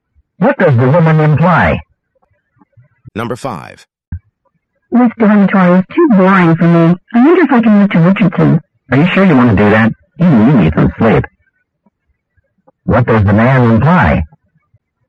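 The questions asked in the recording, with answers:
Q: What does the man imply?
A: Richardson is very noisy, so it would be hard to sleep there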